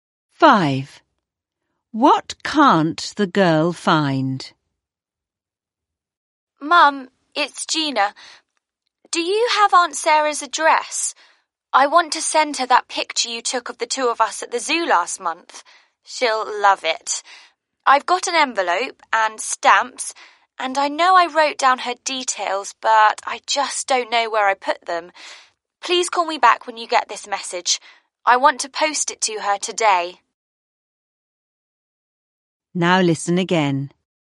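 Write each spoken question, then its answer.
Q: What can't the girl find?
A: Aunt Sarah's address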